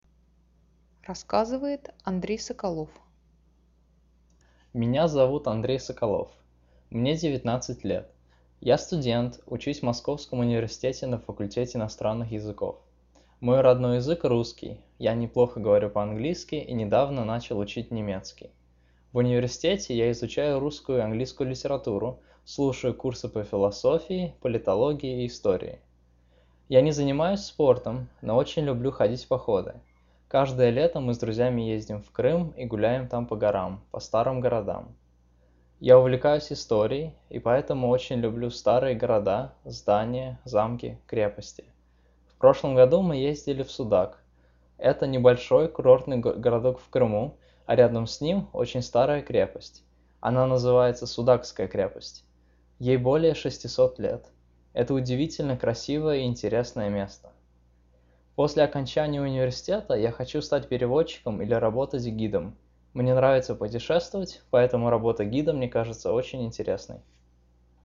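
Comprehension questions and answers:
Now listen to the story and click on the statements that are TRUE.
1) The student studies in Moscow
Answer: True

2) He is taking history at university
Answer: True

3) He does a lot of sports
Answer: False

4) He loves old cities, buildings, castles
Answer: True

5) He was telling about a fortress which is more than 600 years old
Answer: True

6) He wants to become a diplomat one day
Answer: False

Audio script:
Я студент, учусь в Московском университете на факультете иностранных языков.
Мой родной язык русский, я неплохо говорю по-английски и недавно начал учить немецкий.
В университете я изучаю русскую и английскую литературу, слушаю курсы по философии, политологии, истории.
Я не занимаюсь спортом, но очень люблю ходить в походы.
Каждое лето мы с друзьями ездим в Крым и гуляем там по горам, по старым городам.
Я увлекаюсь историей, и поэтому очень люблю старые города, здания, замки, крепости.
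В прошлом году мы ездили в Судак.
Это небольшой курортный городок в Крыму, а рядом с ним – очень старая крепость.
Она называется Судакская крепость.
Ей более шестисот лет.
Это удивительно красивое и интересное место.
После окончания университета я хочу стать переводчиком или работать гидом.
Мне нравится путешествовать, поэтому работа гида мне кажется очень интересной.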